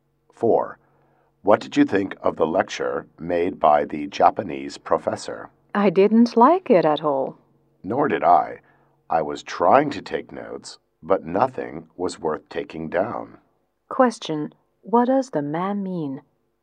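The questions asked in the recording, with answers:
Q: What does the man mean?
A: He didn't like the lecture either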